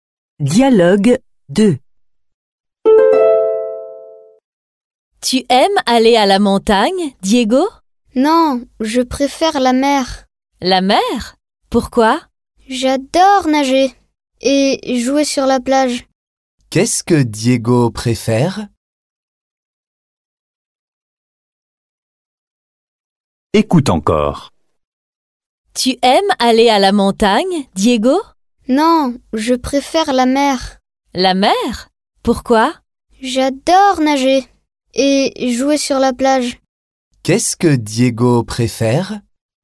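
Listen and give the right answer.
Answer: la mer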